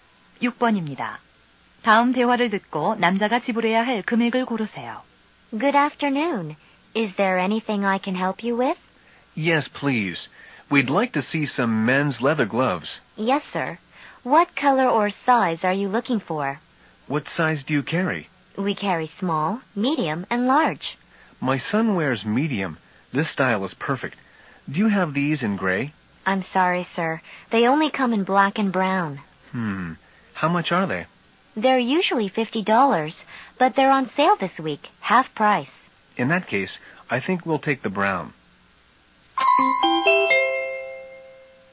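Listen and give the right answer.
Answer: 25달러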